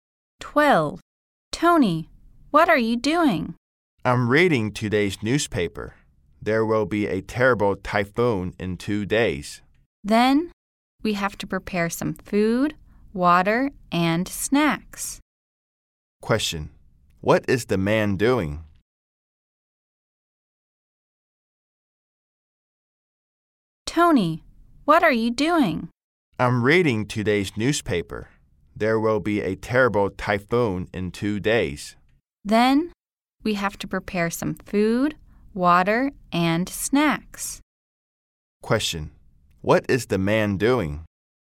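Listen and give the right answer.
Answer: Reading today's newspaper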